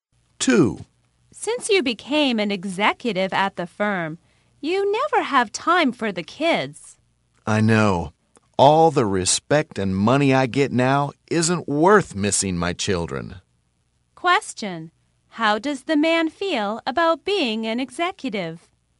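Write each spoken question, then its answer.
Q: How does the man feel about being an executive?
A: The respect and money aren't worth missing his children.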